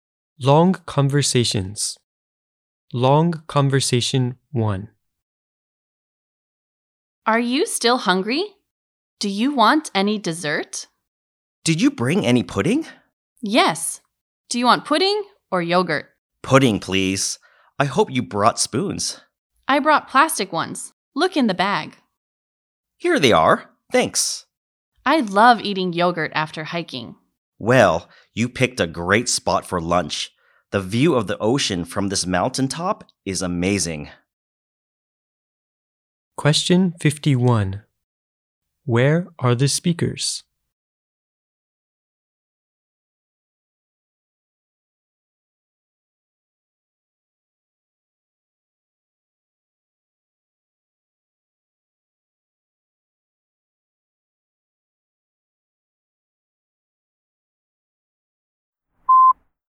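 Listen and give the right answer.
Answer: On a mountaintop overlooking the ocean, having lunch after hiking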